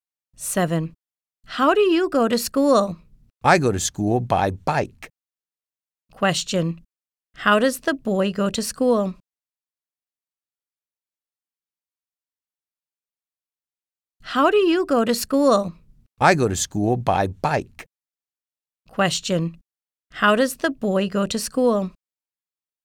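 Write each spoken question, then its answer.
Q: How does the boy go to school?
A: By bike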